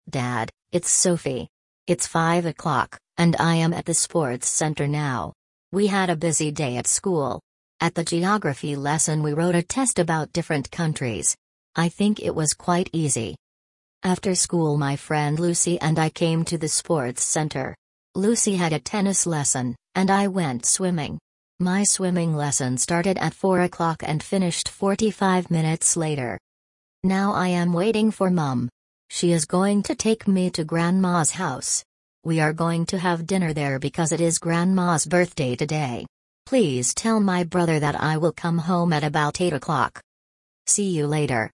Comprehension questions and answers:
Прослушайте текст и определите, какие из приведённых утверждений A–E соответствуют содержанию текста (1 — True), а какие не соответствуют (2 — False). Вы услышите текст дважды.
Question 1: Sophie is speaking to her father.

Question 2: Sophie had a Geography test at school.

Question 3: Sophie went to the sports centre after school.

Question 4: Sophie's swimming lesson lasted one hour.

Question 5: Sophie is going to have dinner at home.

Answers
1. True
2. True
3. True
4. False
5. False

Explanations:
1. Софи обращается к папе: Dad, it's Sophie.
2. На уроке географии ученики писали контрольную работу о разных странах.
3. После школы Софи и Люси пришли в спортивный центр.
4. Занятие по плаванию продолжалось 45 минут, а не один час.
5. Софи собирается ужинать в доме бабушки, а не у себя дома.

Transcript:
Dad, it's Sophie.
It's five o'clock, and I am at the sports centre now. We had a busy day at school. At the Geography lesson we wrote a test about different countries. I think it was quite easy.
After school my friend Lucy and I came to the sports centre. Lucy had a tennis lesson, and I went swimming. My swimming lesson started at four o'clock and finished forty-five minutes later.
Now I am waiting for Mum. She is going to take me to Grandma's house. We are going to have dinner there because it is Grandma's birthday today. Please tell my brother that I will come home at about eight o'clock.
See you later.

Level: 5 класса